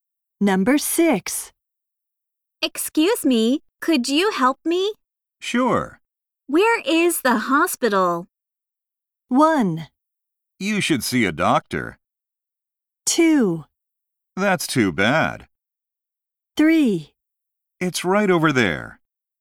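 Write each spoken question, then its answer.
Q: Where is the hospital?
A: 3: It's right over there.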